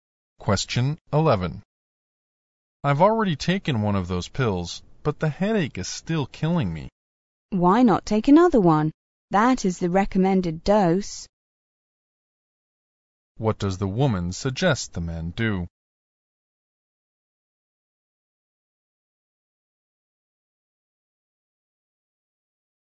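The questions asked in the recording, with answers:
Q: What does the woman suggest the man do?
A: Take another pill.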